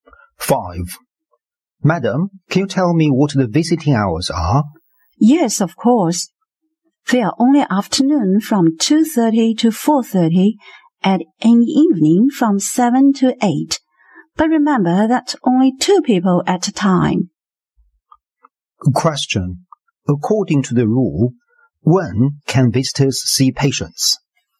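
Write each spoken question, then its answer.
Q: According to the rule, when can visitors see patients?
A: 2:30–4:30 in the afternoon and 7–8 in the evening, two at a time.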